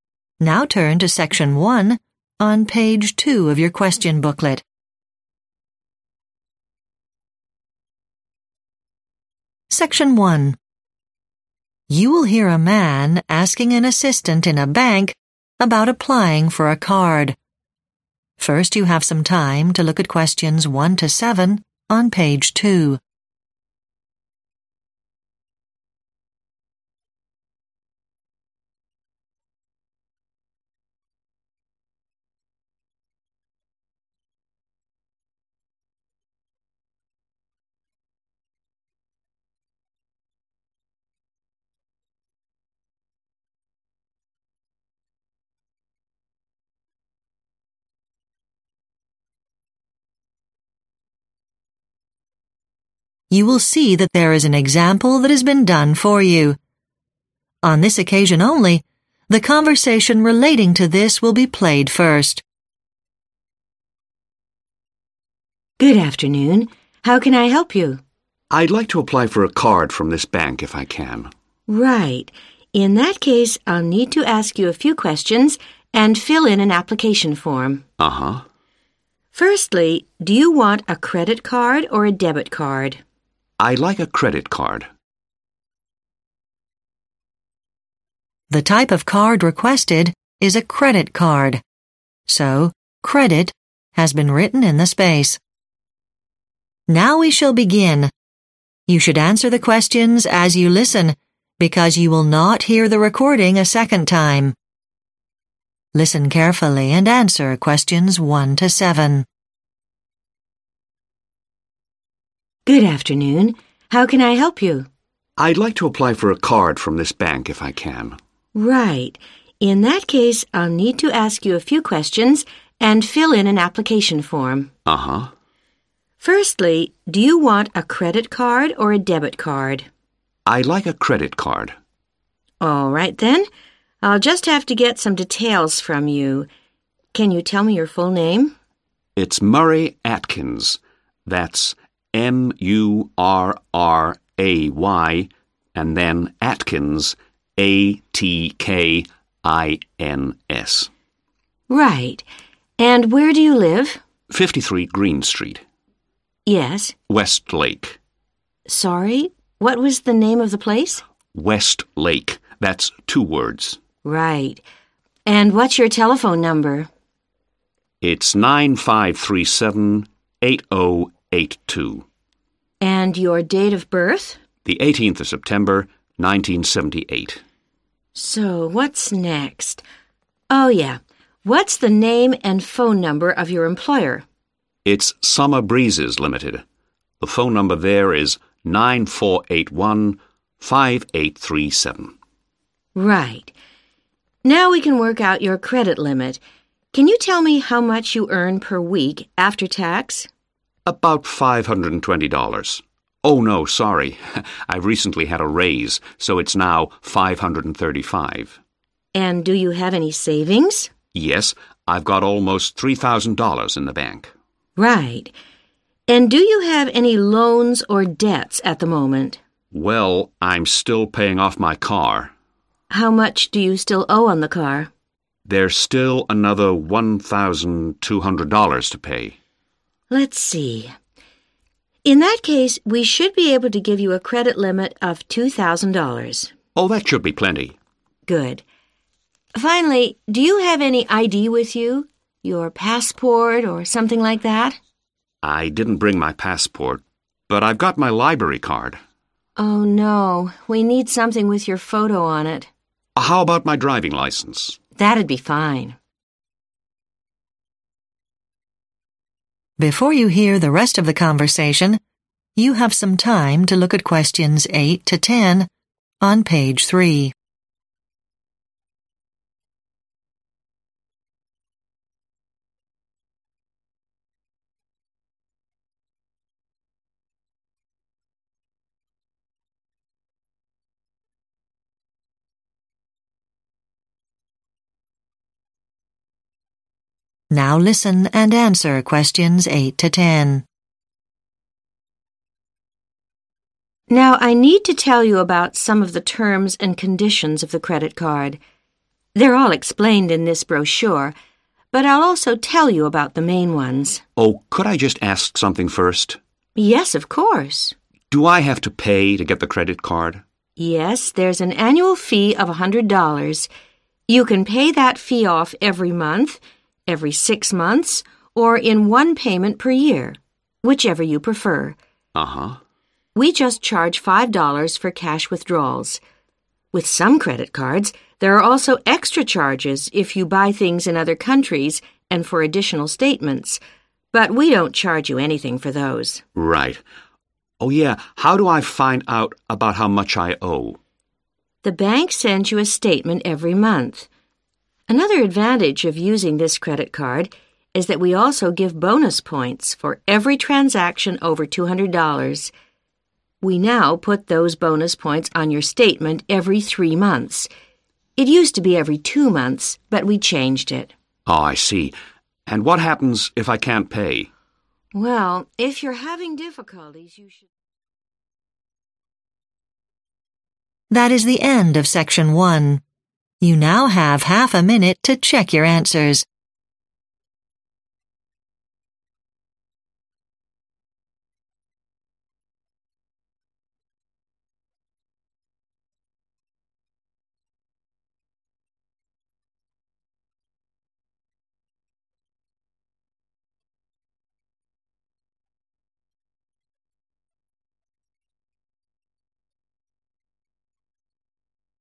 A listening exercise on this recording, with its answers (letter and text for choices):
Complete the form below.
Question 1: Name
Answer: Murray Atkins

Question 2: Address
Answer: 53 Green Street

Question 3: Town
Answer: West Lake

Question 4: Date of birth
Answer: 18th September 1978

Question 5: Work phone no.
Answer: 9481 5837

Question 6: Credit limit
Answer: $2,000

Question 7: Form of I.D.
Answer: driving license

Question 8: The $100 fee is for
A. one month.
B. six months.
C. one year.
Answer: C. one year.

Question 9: There is an additional charge for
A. cash withdrawals.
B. extra statements.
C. foreign purchases.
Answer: A. cash withdrawals.

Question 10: Bonus points appear on the statement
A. every month.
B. every two months.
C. every three months.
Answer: C. every three months.